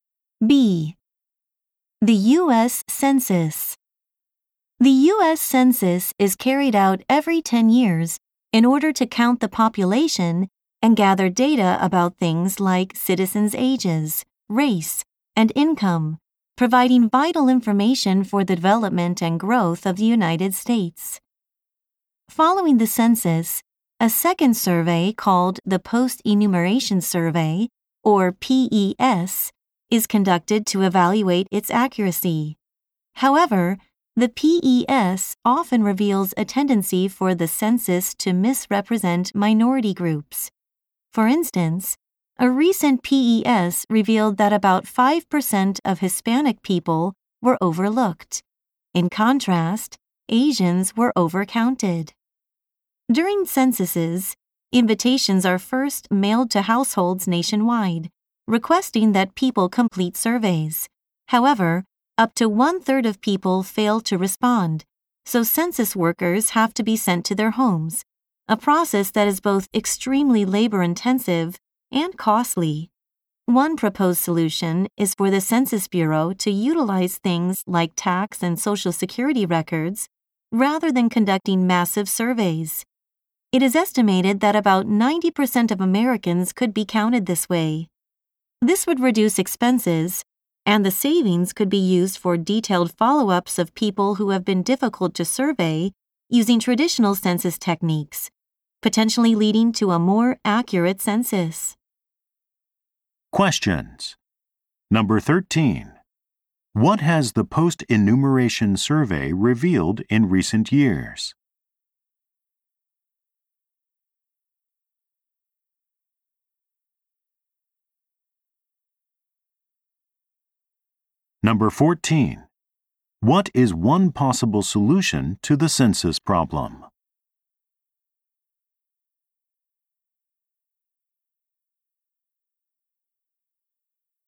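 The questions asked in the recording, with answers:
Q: What has the post-enumeration survey revealed in recent years?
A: The census miscounts minority groups: Hispanic people were undercounted and Asians overcounted.

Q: What is one possible solution to the census problem?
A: Using tax and Social Security records instead of big surveys.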